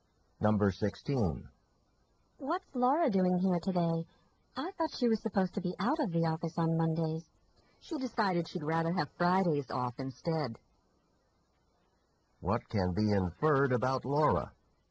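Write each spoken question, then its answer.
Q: What can be inferred about Laura?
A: She now takes Fridays off instead of Mondays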